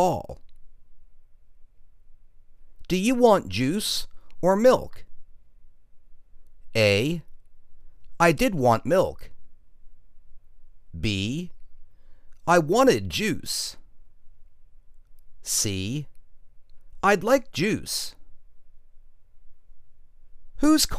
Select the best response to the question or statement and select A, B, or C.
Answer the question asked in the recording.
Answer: I'd like juice.